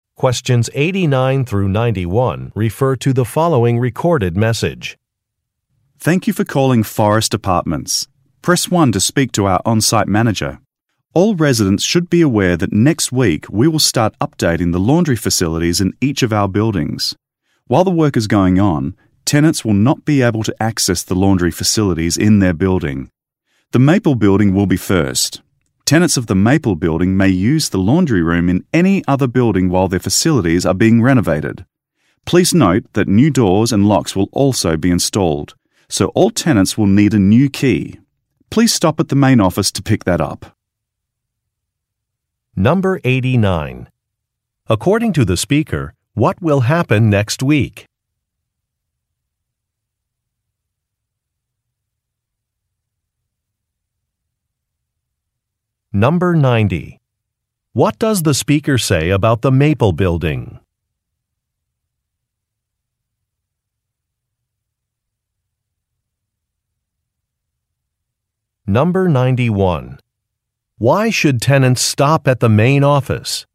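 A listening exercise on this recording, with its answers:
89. According to the speaker, what will happen next week?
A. Some laundry rooms will be updated.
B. The main office of the apartment complex will be closed.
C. Some new tenants will move into a vacant apartment.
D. A parking area will become unavailable.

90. What does the speaker say about the Maple building?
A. It has more tenants than the other buildings.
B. It is the only building with a laundry room.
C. It is first in the project schedule.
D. It is where the main office is located.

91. Why should tenants stop at the main office?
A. To pay a laundry fee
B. To pick up a questionnaire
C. To sign a permission form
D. To receive a new key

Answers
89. A
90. C
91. D

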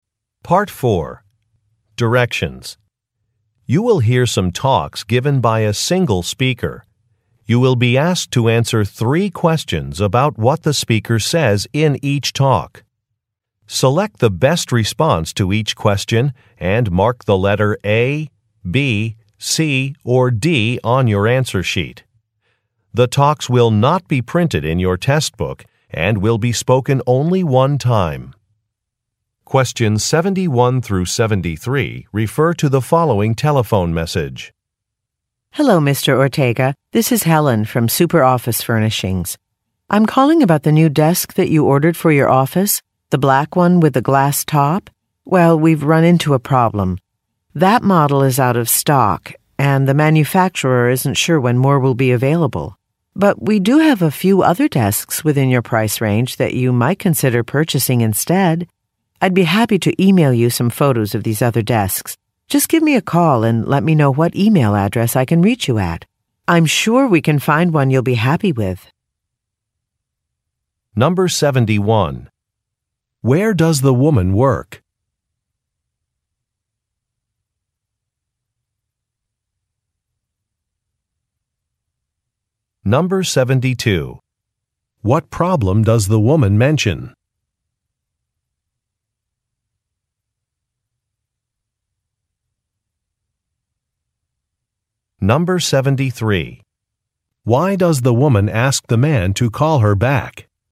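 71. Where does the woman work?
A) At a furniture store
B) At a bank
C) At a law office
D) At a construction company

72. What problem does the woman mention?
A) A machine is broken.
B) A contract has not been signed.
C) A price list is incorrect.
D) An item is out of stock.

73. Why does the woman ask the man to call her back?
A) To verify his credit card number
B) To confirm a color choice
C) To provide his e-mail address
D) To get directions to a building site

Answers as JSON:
{"71": "A", "72": "D", "73": "C"}

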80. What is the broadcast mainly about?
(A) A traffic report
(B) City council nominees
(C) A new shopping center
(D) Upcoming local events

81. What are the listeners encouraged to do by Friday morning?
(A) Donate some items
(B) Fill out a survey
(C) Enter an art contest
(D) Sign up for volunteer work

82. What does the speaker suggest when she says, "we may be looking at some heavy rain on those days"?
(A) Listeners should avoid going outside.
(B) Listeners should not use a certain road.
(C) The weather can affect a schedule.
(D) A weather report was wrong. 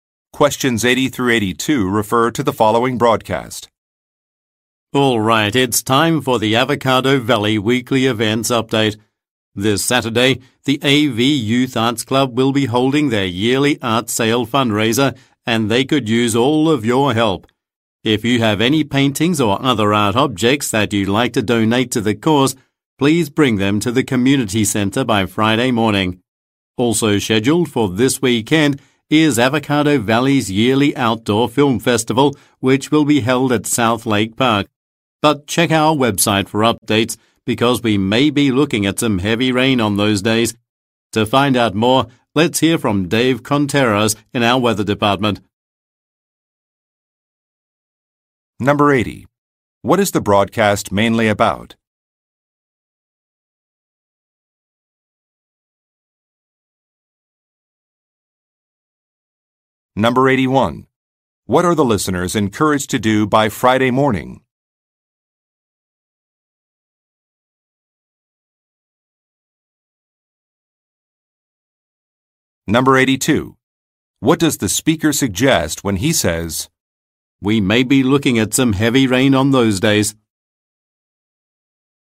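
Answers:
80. D
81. A
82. C

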